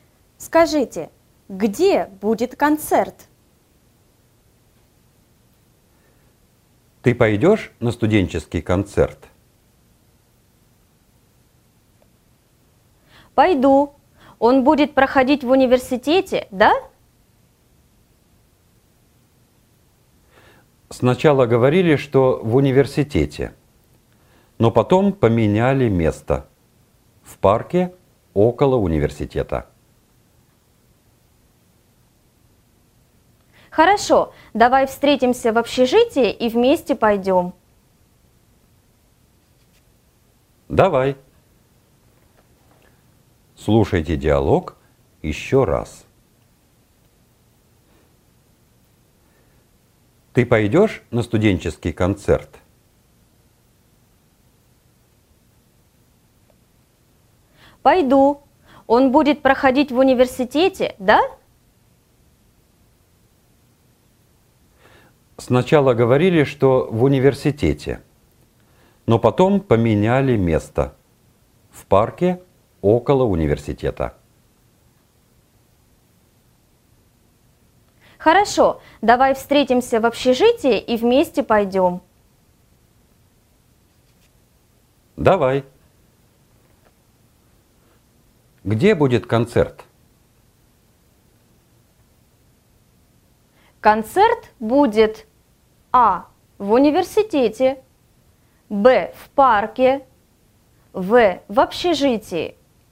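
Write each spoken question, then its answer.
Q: Где будет концерт?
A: Б: В парке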